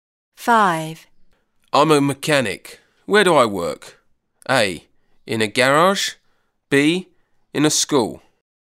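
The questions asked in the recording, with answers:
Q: I'm a mechanic. Where do I work?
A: A: In a garage.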